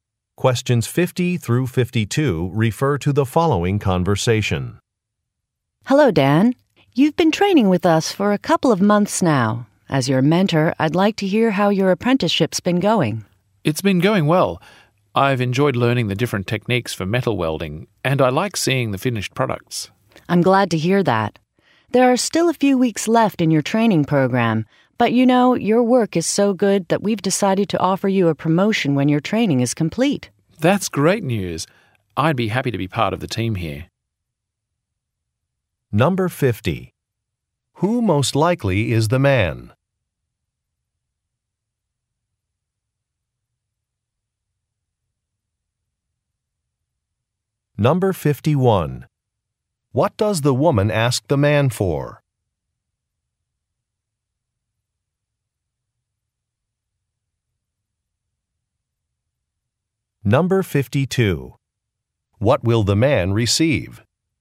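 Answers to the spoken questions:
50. An apprentice welder
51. Feedback on how his apprenticeship is going
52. A promotion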